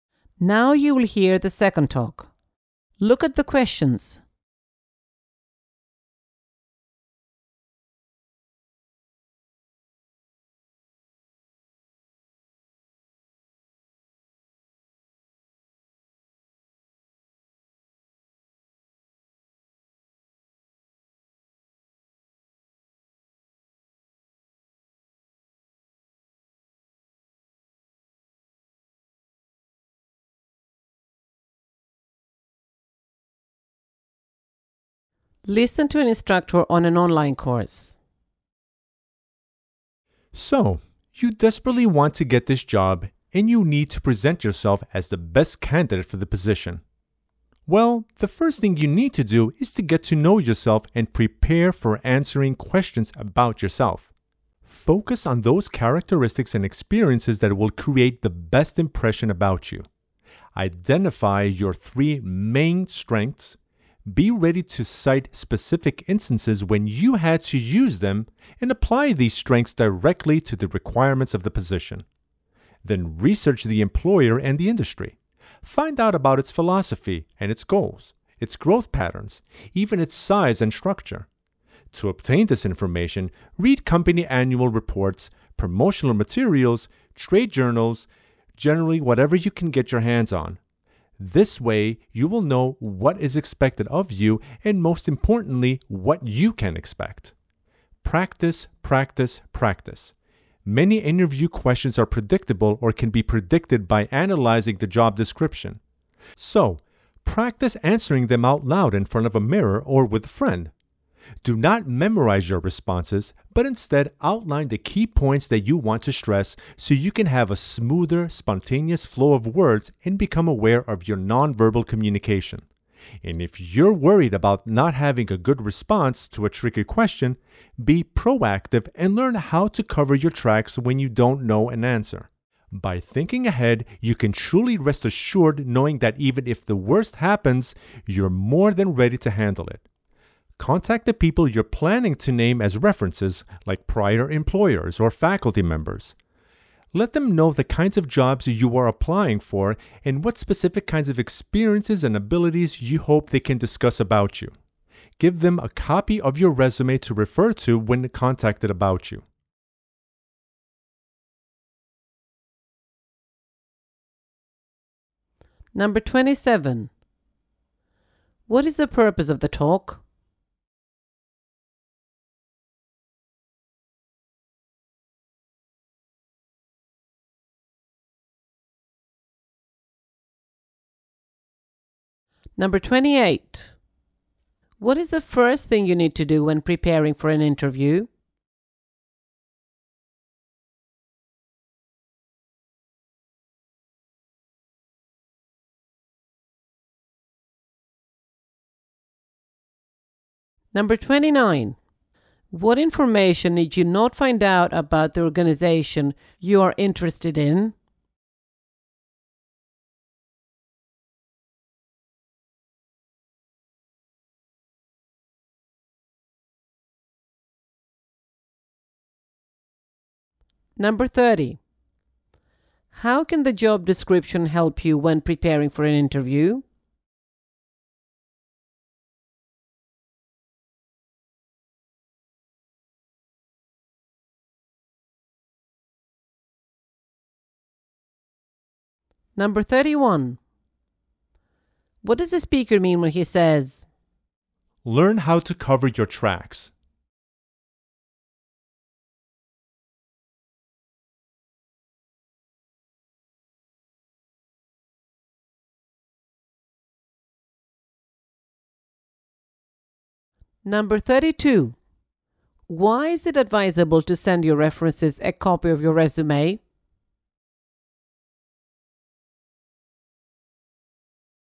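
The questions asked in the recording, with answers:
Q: What is the purpose of the talk?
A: To give advice on preparing for a job interview

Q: What is the first thing you need to do when preparing for an interview?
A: Get to know yourself and prepare to answer questions about yourself

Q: How can the job description help you when preparing for an interview?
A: It helps you predict the interview questions

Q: What does the speaker mean when he says,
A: Know how to handle a question you can't answer

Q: Why is it advisable to send your references a copy of your resume?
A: So they can refer to it when they are contacted about you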